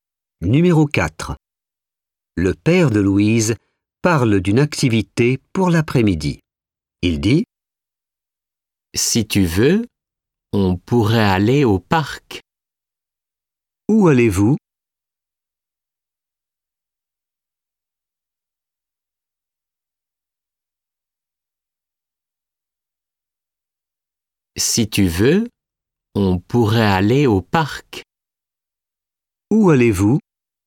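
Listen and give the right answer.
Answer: au parc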